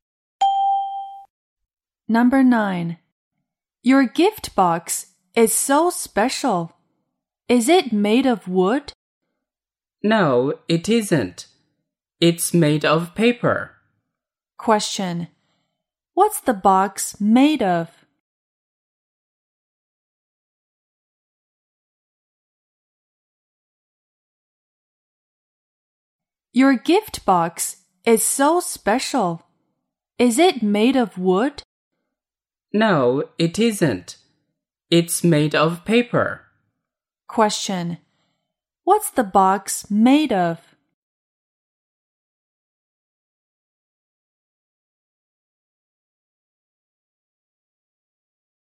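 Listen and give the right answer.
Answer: Paper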